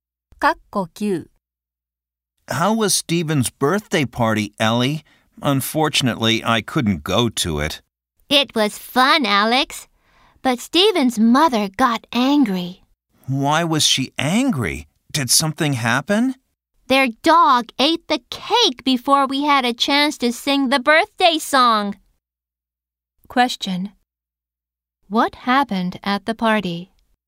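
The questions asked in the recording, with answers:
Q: What happened at the party?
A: The dog ate the birthday cake.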